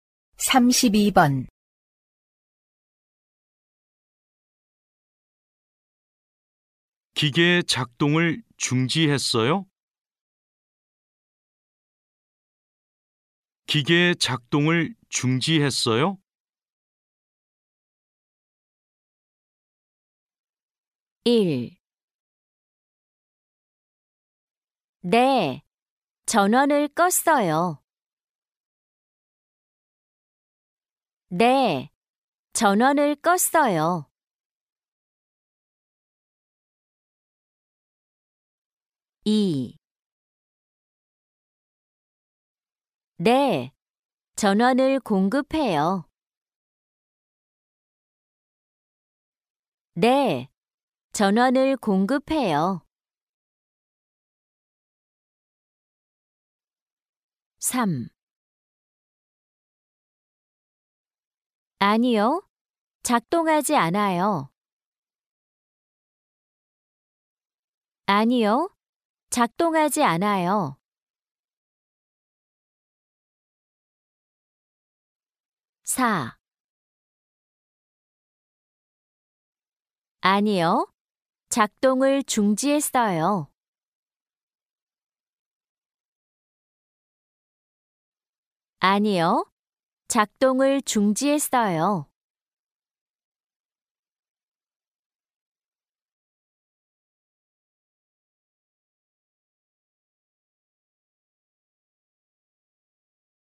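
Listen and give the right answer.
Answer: 1: 네, 전원을 껐어요.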